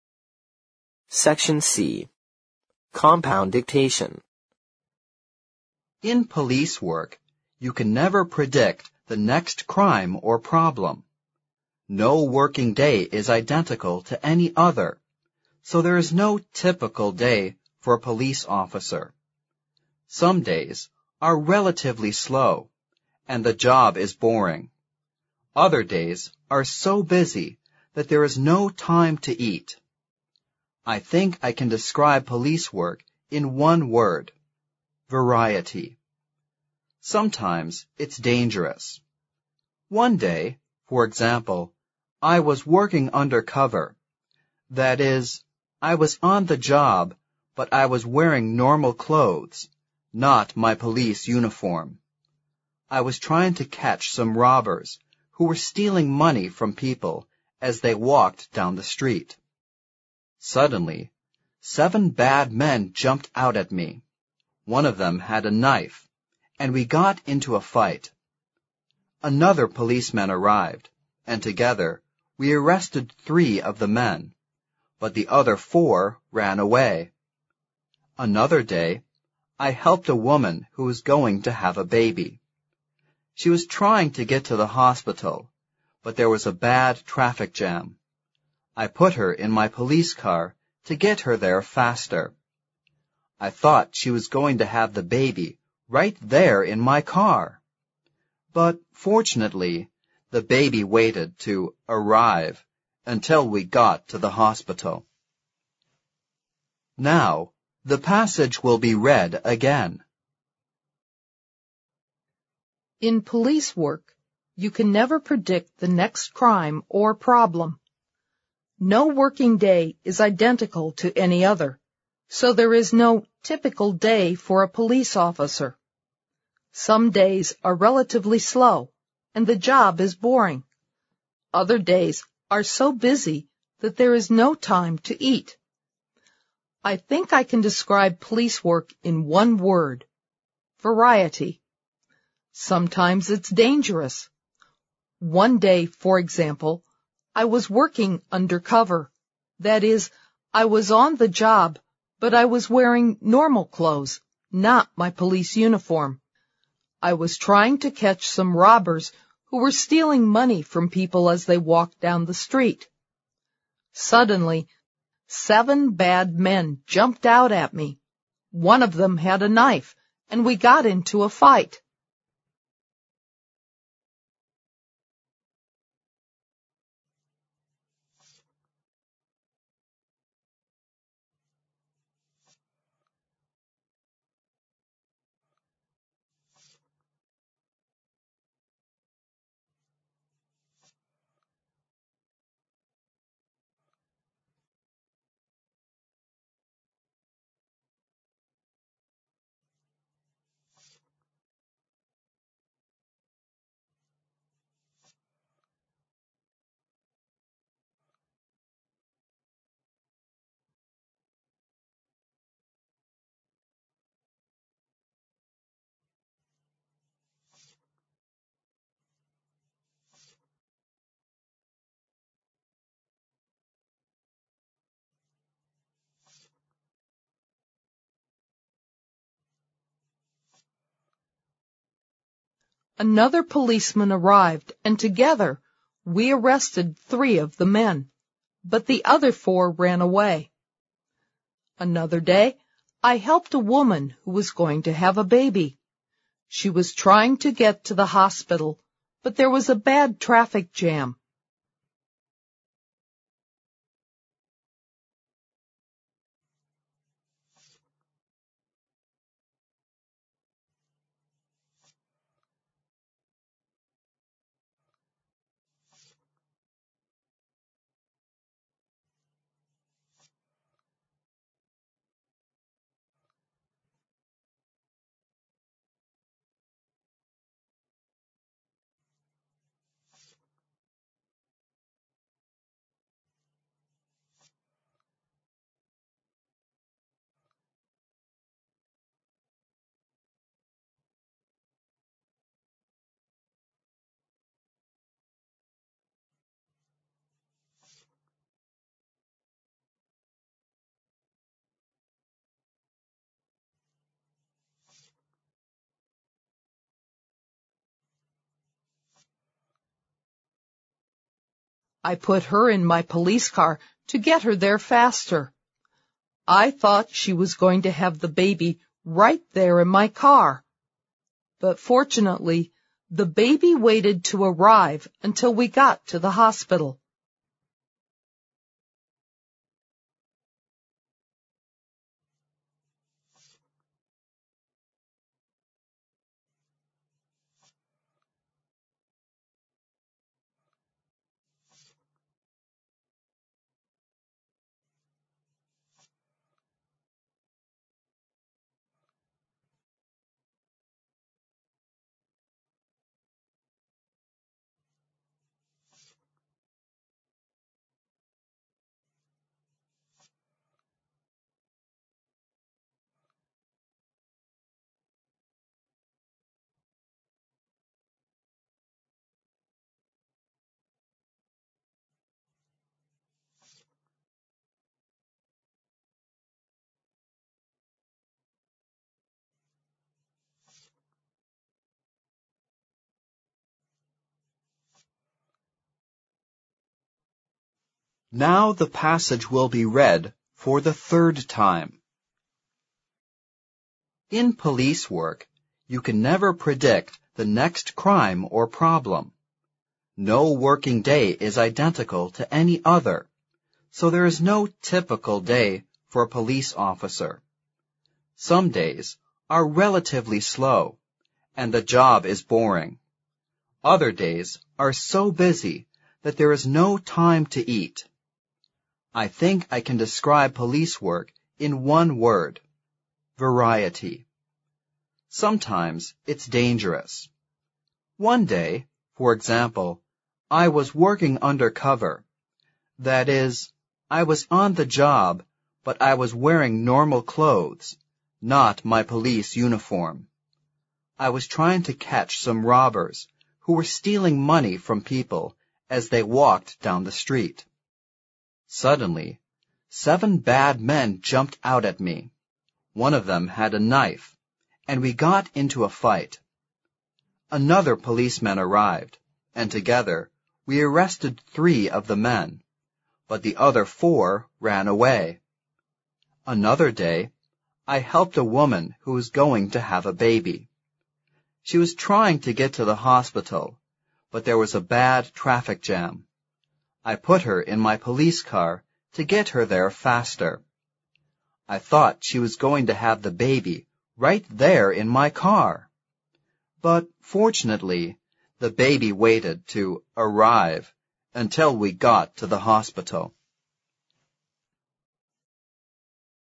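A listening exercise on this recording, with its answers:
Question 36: No working day is (36) ______ to any other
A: identical

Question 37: so there is no "(37) ______ " day for a police officer.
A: typical

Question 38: Some days are (38) ______ slow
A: relatively

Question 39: and the job is (39) ______ ;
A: boring

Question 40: I think I can (40) ______ police work in one word:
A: describe

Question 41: police work in one word: (41) ______ .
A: variety

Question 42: but I was wearing (42) ______ clothes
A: normal

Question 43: not my police (43) ______ .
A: uniform

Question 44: Suddenly, (44) __________________________________________________ .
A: seven bad men jumped out at me. One of them had a knife, and we got into a fight

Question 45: (45) __________________________________________________________ .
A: She was trying to get to the hospital, but there was a bad traffic jam

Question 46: (46) _______________________________________________________________ .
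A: But fortunately, the baby waited to arrive until we got to the hospital

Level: 四级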